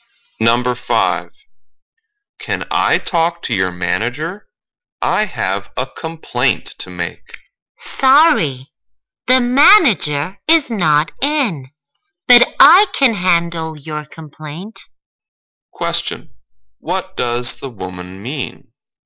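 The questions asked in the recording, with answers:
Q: What does the woman mean?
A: She can handle the complaint herself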